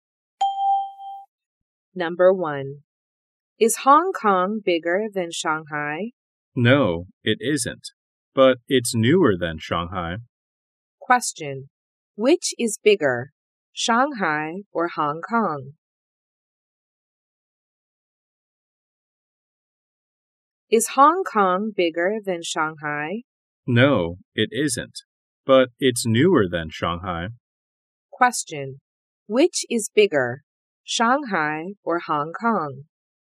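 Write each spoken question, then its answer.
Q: Which is bigger, Shanghai or Hong Kong?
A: Shanghai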